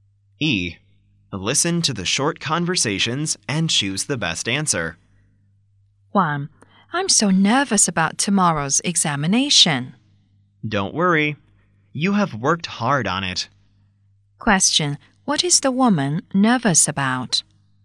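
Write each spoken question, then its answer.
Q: What is the woman nervous about?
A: Tomorrow's examination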